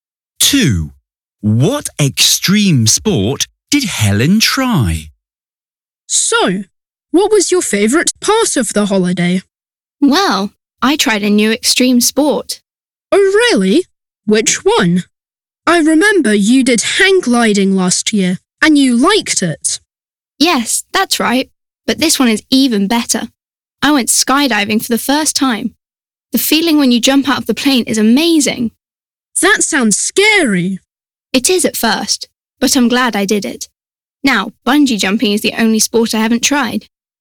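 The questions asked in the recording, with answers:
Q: What extreme sport did Helen try?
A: skydiving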